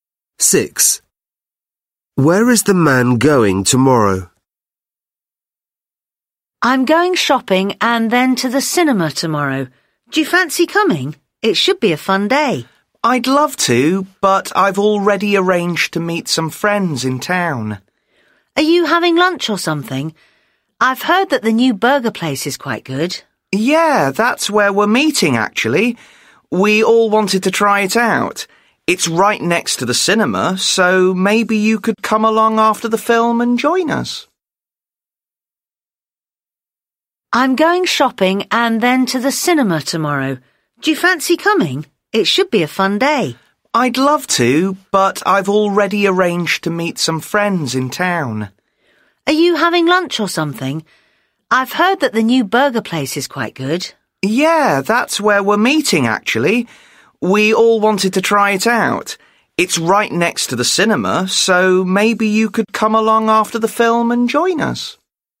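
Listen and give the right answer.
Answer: the new burger place next to the cinema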